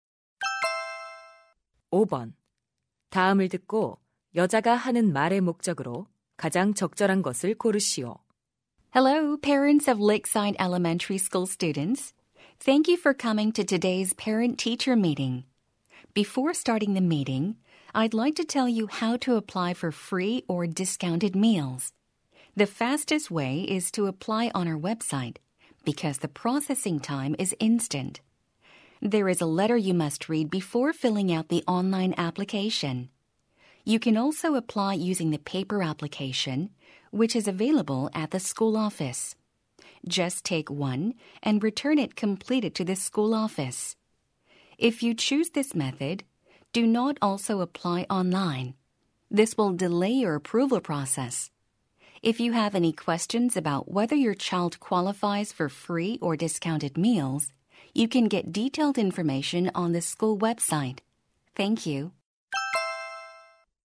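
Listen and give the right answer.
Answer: 무료·할인 급식 신청 방법을 안내하려고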